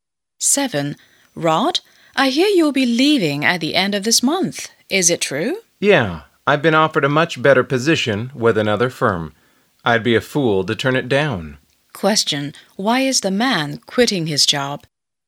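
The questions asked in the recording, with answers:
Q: Why is the man quitting his job?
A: He has been offered a much better position with another firm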